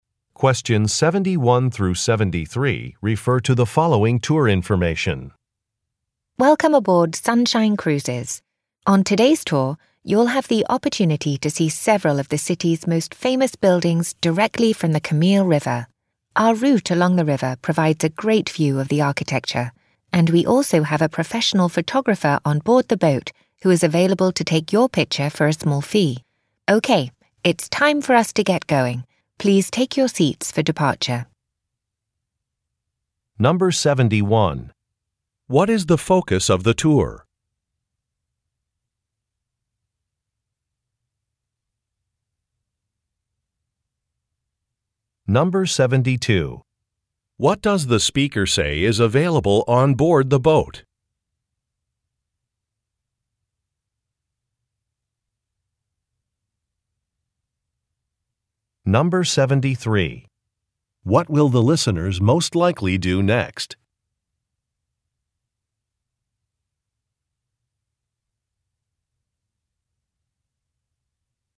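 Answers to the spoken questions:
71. The city's famous buildings (architecture)
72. A professional photographer who will take your picture for a small fee
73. Take their seats for departure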